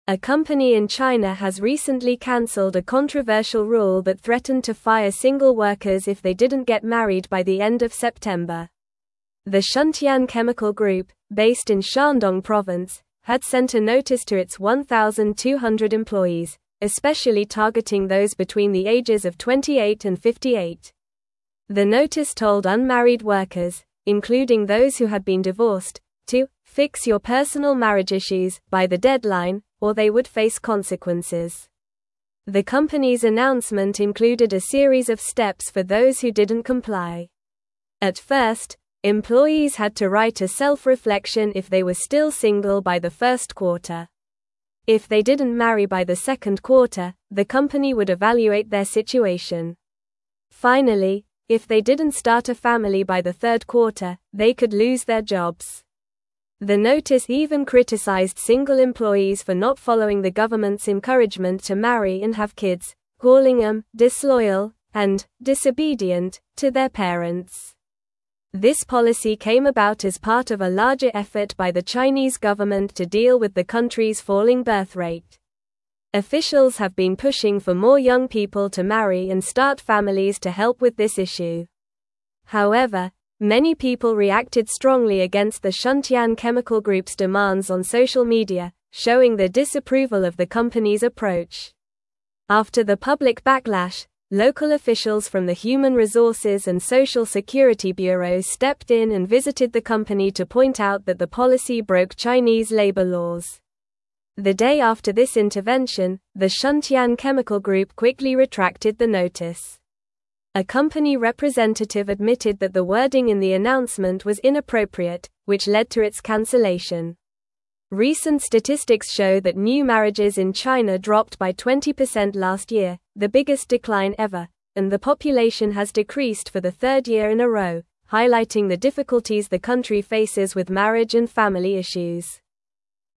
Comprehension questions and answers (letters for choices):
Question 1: What company in China canceled a controversial rule about marriage?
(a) Huawei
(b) Shuntian Chemical Group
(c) Alibaba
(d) Tencent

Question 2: What age range did the company's notice primarily target?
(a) 18 to 28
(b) 30 to 40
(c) 28 to 58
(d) 25 to 35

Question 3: What did the notice require unmarried workers to do by the end of September?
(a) Get married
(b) Change jobs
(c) Move to a different city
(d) Take a vacation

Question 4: What consequence did employees face if they did not comply with the company's marriage policy?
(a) They would receive a bonus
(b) They would be promoted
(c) They could lose their jobs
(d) They would get a raise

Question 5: What did the notice criticize single employees for not doing?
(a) Attending company events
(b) Following the government's encouragement to marry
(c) Completing their work on time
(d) Participating in team-building activities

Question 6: Why did local officials intervene with the Shuntian Chemical Group?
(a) The policy broke Chinese labor laws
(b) The company was underperforming financially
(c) Employees complained about their workload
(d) The company was expanding too quickly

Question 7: What was the reaction of many people on social media regarding the company's demands?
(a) They supported the company's policy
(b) They ignored the issue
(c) They praised the company for its initiative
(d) They showed strong disapproval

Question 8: What recent trend has been observed in new marriages in China?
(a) They increased significantly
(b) They remained the same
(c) They doubled in number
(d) They dropped by 20% last year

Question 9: if they didn't get married by the end of (3)______.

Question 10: The Shuntian (4)______ Group, based in Shandong province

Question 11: the company would evaluate their (5)______.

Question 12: if they didn't (6)______ a family by the third quarter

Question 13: for not following the government's (7)______ to marry and have kids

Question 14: "disloyal" and "disobedient" to their (8)______.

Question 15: This policy came about as part of a (9)______ effort by the Chinese government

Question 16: to deal with the country's (10)______ birth rate.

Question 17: Officials have been pushing for more young (11)______ to marry and start families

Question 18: on social media, (12)______ their disapproval of the company's approach.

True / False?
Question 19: Local officials did not intervene because the company's policy followed Chinese labor laws.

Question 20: The company had a series of rewards for single employees, including writing a self-reflection if they were still single after the first quarter.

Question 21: The policy was part of a larger effort by the Chinese government to encourage marriage and increase the birth rate.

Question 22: The Shuntian Chemical Group targeted workers of all ages with their marriage rule.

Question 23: After the backlash, the Shuntian Chemical Group canceled the marriage rule and admitted the wording was inappropriate.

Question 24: Many people reacted negatively to the company's demands on social media, showing they didn't agree with the approach.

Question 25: Unmarried employees were told to "fix your personal marriage issues" or face consequences.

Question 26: A company in China tried to promote single employees if they didn't get married by the end of September.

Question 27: What was the controversial rule that the Shuntian Chemical Group had for its single employees?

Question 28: What role did local officials from the human resources and social security bureau play in this situation?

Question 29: Why did the Shuntian Chemical Group decide to cancel the notice about the marriage policy?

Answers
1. b
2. c
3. a
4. c
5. b
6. a
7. d
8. d
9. September
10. Chemical
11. situation
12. start
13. encouragement
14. parents
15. larger
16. falling
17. people
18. showing
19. False
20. False
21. True
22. False
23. True
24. True
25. True
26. False
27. The controversial rule was that single employees would be fired if they didn't get married by the end of September.
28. Local officials intervened by visiting the company to inform them that their policy broke Chinese labor laws, which led to the company retracting the notice.
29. The company decided to cancel the notice because a representative admitted that the wording in the announcement was inappropriate after the public backlash and intervention from officials.

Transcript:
A company in China has recently canceled a controversial rule that threatened to fire single workers if they didn't get married by the end of September. The Shuntian Chemical Group, based in Shandong province, had sent a notice to its 1,200 employees, especially targeting those between the ages of 28 and 58. The notice told unmarried workers, including those who had been divorced, to "fix your personal marriage issues" by the deadline, or they would face consequences.
The company's announcement included a series of steps for those who didn't comply. At first, employees had to write a self-reflection if they were still single by the first quarter. If they didn't marry by the second quarter, the company would evaluate their situation. Finally, if they didn't start a family by the third quarter, they could lose their jobs. The notice even criticized single employees for not following the government's encouragement to marry and have kids, calling them "disloyal" and "disobedient" to their parents.
This policy came about as part of a larger effort by the Chinese government to deal with the country's falling birth rate. Officials have been pushing for more young people to marry and start families to help with this issue. However, many people reacted strongly against the Shuntian Chemical Group's demands on social media, showing their disapproval of the company's approach.
After the public backlash, local officials from the human resources and social security bureau stepped in and visited the company to point out that the policy broke Chinese labor laws. The day after this intervention, the Shuntian Chemical Group quickly retracted the notice. A company representative admitted that the wording in the announcement was inappropriate, which led to its cancellation. Recent statistics show that new marriages in China dropped by 20% last year, the biggest decline ever, and the population has decreased for the third year in a row, highlighting the difficulties the country faces with marriage and family issues.

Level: Level 3